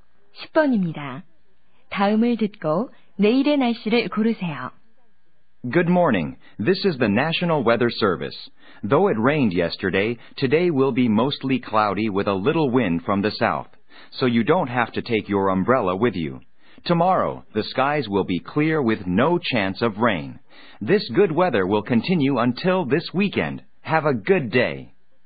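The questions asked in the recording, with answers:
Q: 다음을 듣고 내일의 날씨를 고르세요.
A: 맑음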